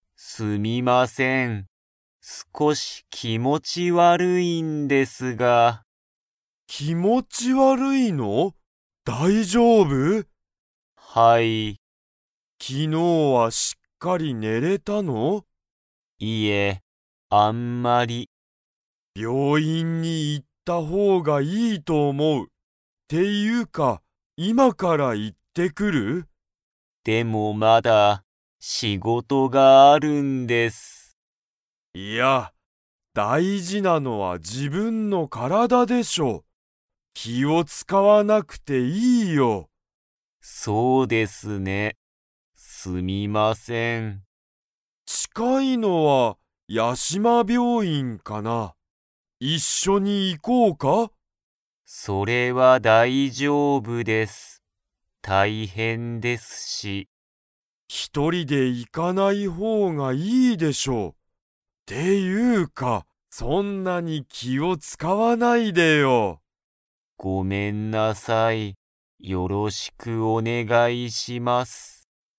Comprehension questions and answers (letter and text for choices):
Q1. 内村うちむらさんには仕事しごとが 。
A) まだある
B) もうない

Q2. 病院びょういんには、誰だれが行いきますか?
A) 内村うちむらさん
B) 山田やまださん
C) 内村うちむらさんと山田やまださん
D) 誰だれも行いかない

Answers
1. A) まだある
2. C) 内村うちむらさんと山田やまださん

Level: Level 3